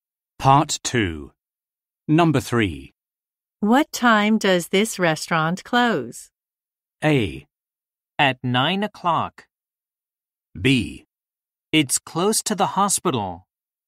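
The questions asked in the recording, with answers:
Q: What time does this restaurant close?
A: A: At 9 o'clock.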